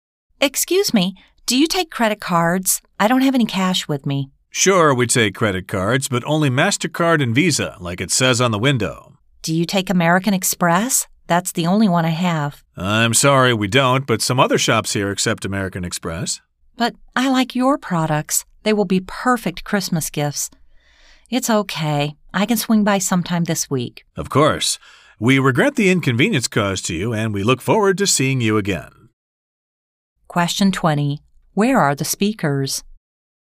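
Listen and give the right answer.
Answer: In a shop (store)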